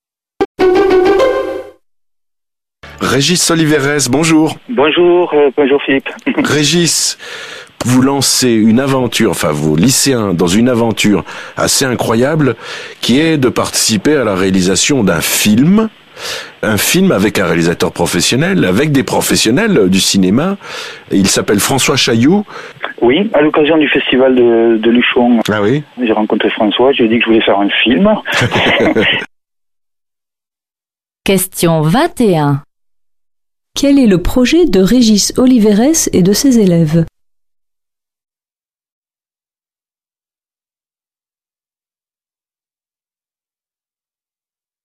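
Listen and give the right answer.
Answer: Participer à la réalisation d'un film avec un réalisateur professionnel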